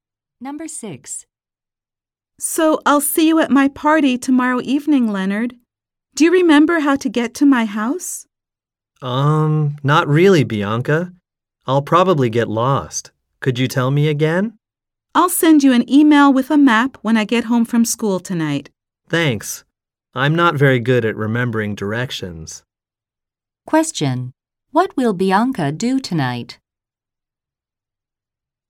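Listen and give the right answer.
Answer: Send Leonard an email with a map.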